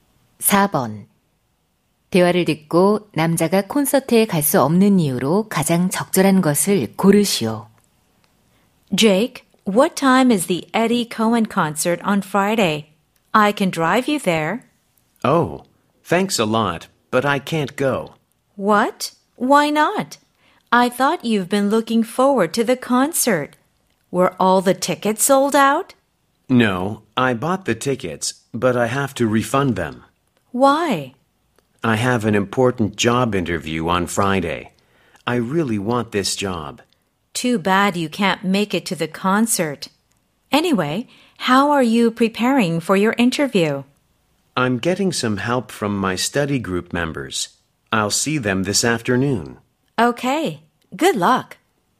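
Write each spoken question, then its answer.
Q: 대화를 듣고 남자가 콘서트에 갈 수 없는 이유로 가장 적절한 것을 고르시오.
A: 중요한 취업 면접이 있어서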